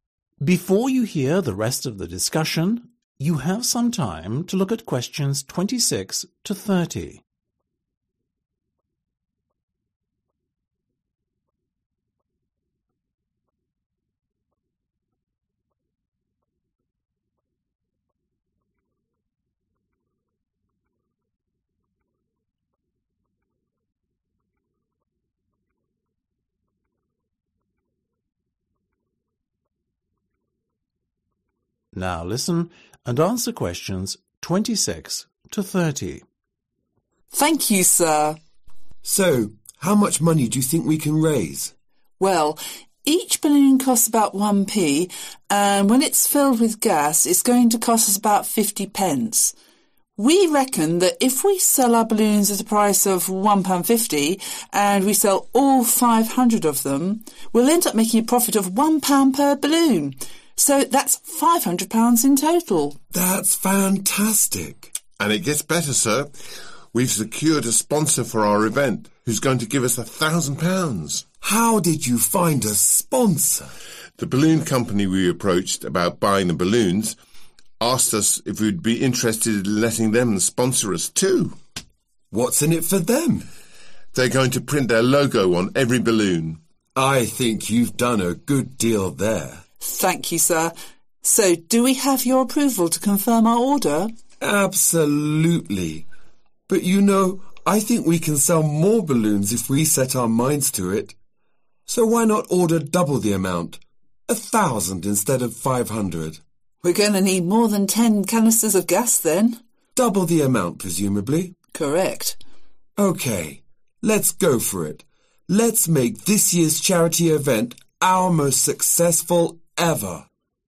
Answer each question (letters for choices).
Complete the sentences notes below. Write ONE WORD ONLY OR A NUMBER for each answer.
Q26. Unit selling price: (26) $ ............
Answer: 1.50

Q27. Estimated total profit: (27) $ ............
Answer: 500

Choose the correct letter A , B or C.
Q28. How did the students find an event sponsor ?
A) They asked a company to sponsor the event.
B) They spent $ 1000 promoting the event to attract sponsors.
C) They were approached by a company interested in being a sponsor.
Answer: C

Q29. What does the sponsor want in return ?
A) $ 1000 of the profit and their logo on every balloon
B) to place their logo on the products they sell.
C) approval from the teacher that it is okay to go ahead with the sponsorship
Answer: B

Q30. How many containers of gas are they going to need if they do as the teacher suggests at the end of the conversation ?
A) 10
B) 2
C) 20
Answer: C